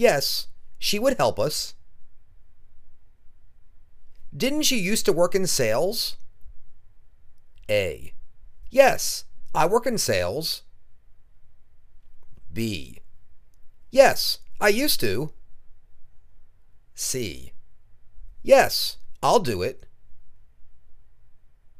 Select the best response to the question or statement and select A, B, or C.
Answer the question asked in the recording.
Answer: Yes, I used to.